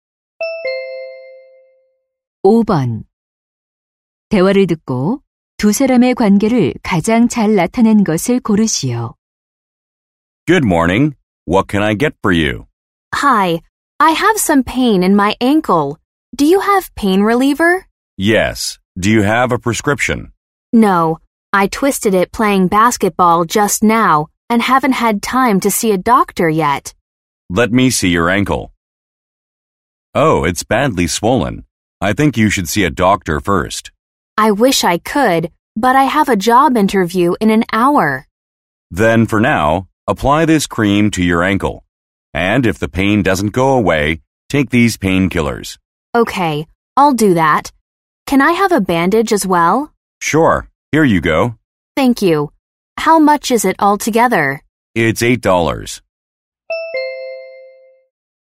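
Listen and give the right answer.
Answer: 약사 - 손님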